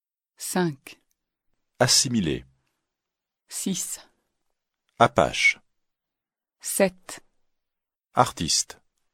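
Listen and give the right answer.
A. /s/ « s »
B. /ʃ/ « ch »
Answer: B. /ʃ/ « ch »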